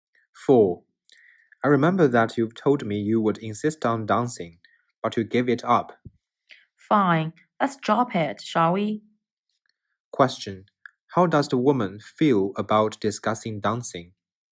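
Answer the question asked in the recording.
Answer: She doesn't want to talk about it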